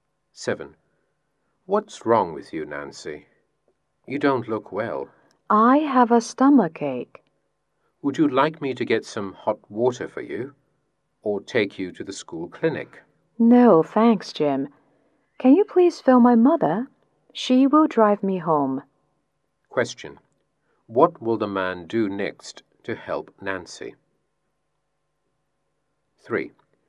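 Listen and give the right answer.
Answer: Call Nancy's mother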